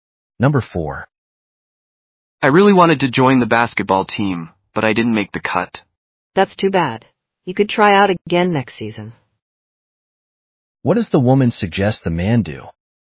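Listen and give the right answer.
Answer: Try out again next season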